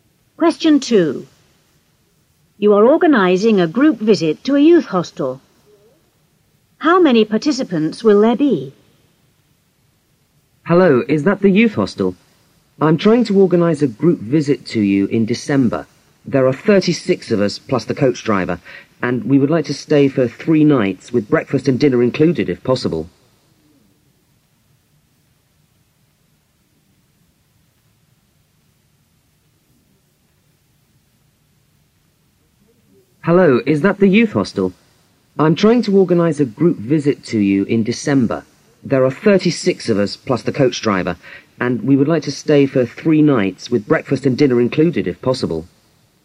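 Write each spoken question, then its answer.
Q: How many participants will there be?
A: 37 (36 plus the coach driver)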